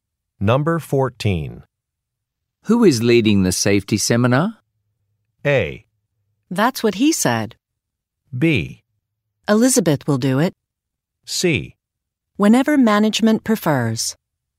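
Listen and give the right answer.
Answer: B: Elizabeth will do it.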